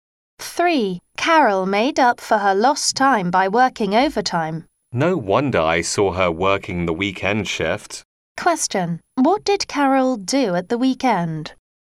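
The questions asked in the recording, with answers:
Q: What did Carol do at the weekend?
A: She worked overtime (the weekend shift)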